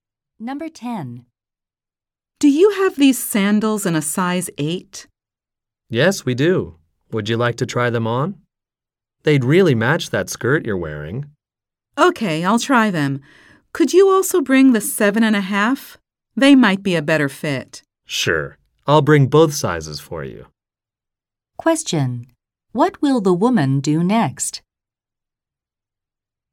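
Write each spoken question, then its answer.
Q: What will the woman do next?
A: Try on the sandals in two sizes.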